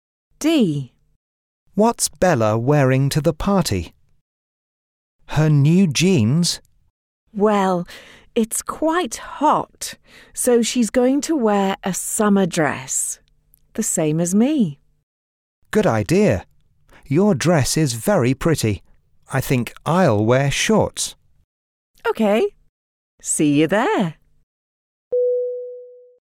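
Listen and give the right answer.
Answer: A summer dress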